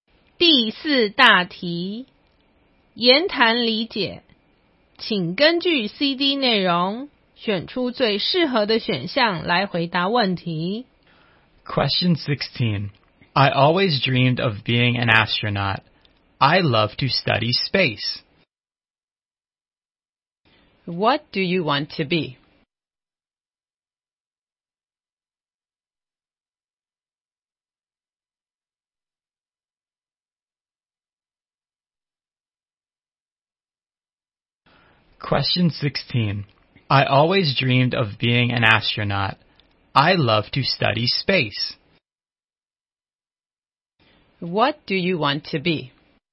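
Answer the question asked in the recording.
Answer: An astronaut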